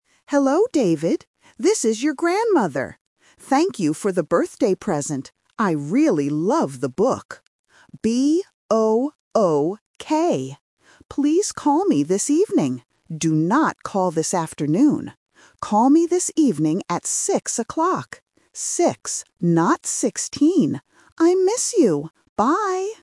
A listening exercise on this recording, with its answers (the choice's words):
Listen to the voicemail from a grandmother. Choose the correct answer (A, B, or C) for each question.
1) What is the grandmother's birthday present?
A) A box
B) A book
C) A bag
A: A book

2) When should David call his grandmother?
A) In the morning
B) In the afternoon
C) In the evening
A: In the evening

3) What time should David call?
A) 6 o'clock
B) 16 o'clock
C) 7 o'clock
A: 6 o'clock

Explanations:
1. The grandmother says, "I really love the book," and spells it out: B-O-O-K. Option A (A box) is a phonetic trap because it sounds similar to "book" and starts with the letter B. Option C (A bag) is just a plausible present.
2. The grandmother says clearly, "Please call me this evening." Option B (In the afternoon) is a trap because she explicitly says, "Do not call this afternoon." Option A (In the morning) is never mentioned.
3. The grandmother tells David to call at "6 o'clock." She also repeats "Six" and says "Not sixteen" to be very clear. Option B (16 o'clock) is the main trap because the number 16 is mentioned but rejected. Option C (7 o'clock) is a plausible time but is not mentioned.